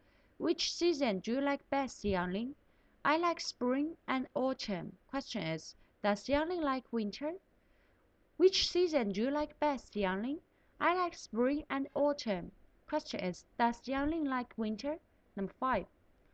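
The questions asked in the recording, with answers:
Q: does Yangling like winter?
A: No, she doesn't.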